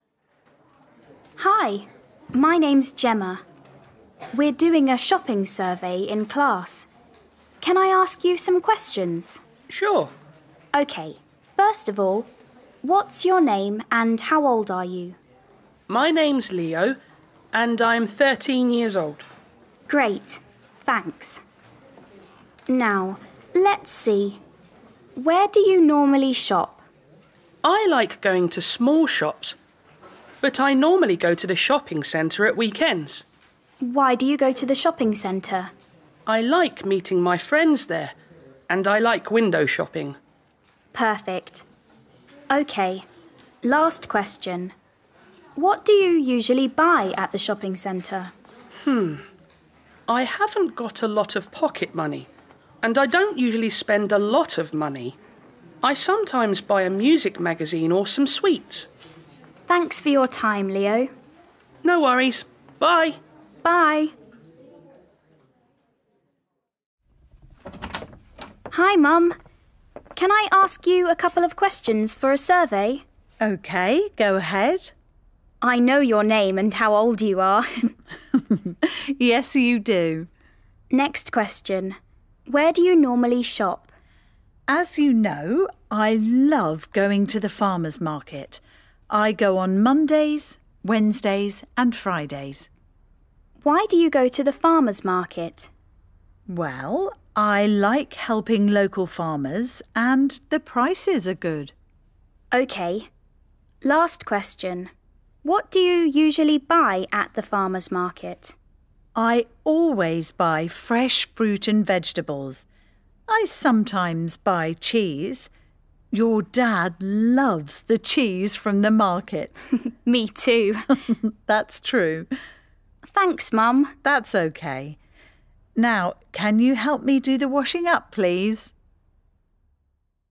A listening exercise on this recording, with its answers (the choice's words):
1. Listen to Gemma talking to two people about shopping. Tick the correct answers.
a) at charity shops.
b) at the Farmers' Market.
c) at the shopping centre.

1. Leo likes shopping ...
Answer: at the shopping centre.

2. Gemma's mum likes shopping ...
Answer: at the Farmers' Market.

2. Listen again and match the two halves of the sentences.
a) window shopping at the shopping centre.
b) three times a week.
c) fruit and vegetables.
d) music magazines.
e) 13 years old.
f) cheese.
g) the local products and the prices.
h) at weekends.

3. Leo is ...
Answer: 13 years old.

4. Leo likes ...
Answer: window shopping at the shopping centre.

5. Leo goes shopping ...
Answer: at weekends.

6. Leo sometimes buys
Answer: music magazines.

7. Gemma's mum goes shopping ...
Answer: three times a week.

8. She likes ...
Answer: the local products and the prices.

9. She always buys ...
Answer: fruit and vegetables.

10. Gemma and her dad love ...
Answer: cheese.